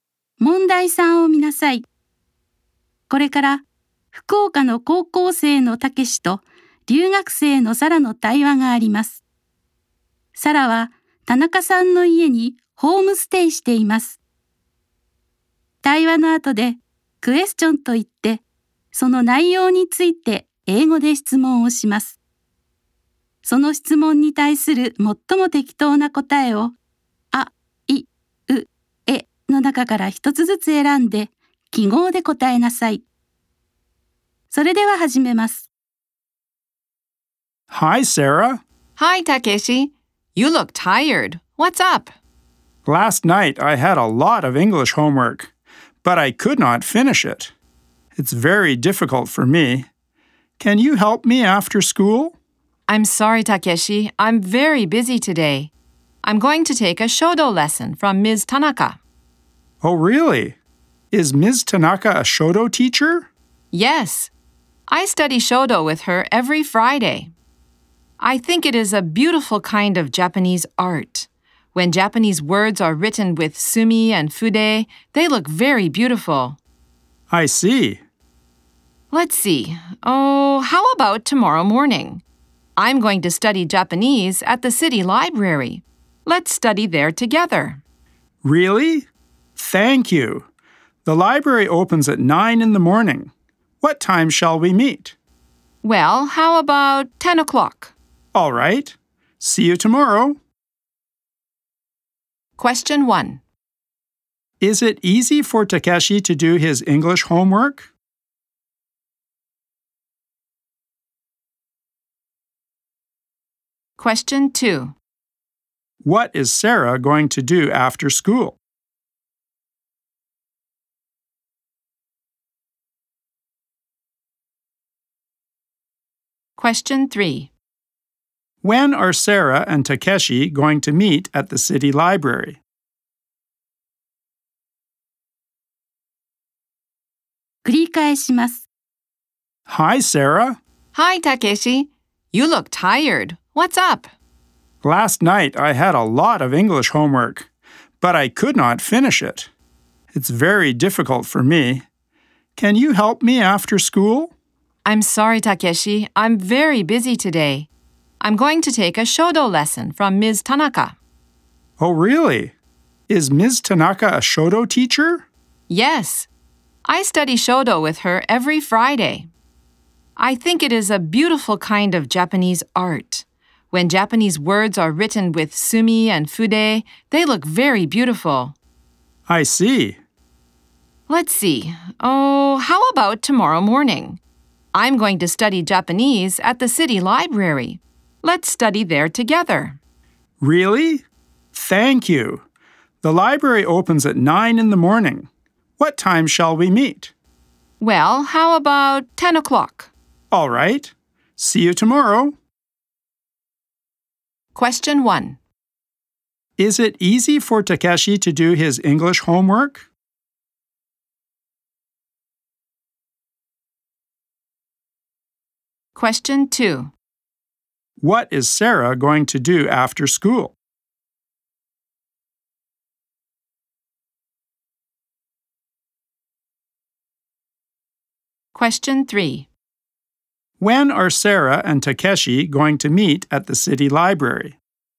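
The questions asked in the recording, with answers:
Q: Is it easy for Takeshi to do his English homework?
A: No, it isn't.

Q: What is Sarah going to do after school?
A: She is going to take a shodo lesson from Ms. Tanaka.

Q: When are Sarah and Takeshi going to meet at the city library?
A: At 10 o'clock tomorrow morning.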